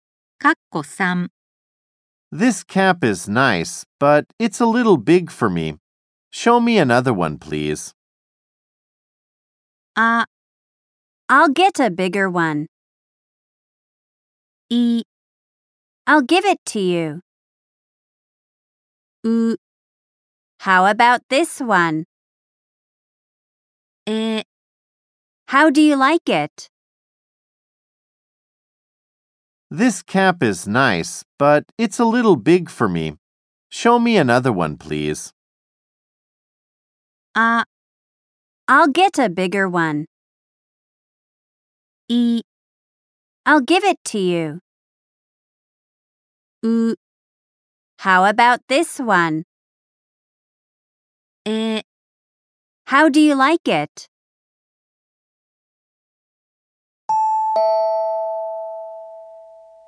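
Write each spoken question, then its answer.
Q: This cap is nice, but it's a little big for me. Show me another one, please.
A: う: How about this one?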